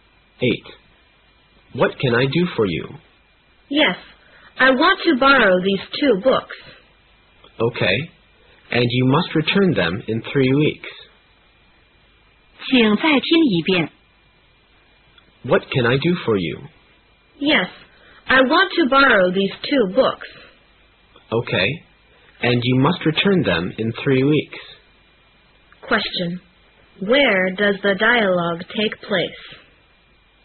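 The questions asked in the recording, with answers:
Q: Where does the dialogue take place?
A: In a library.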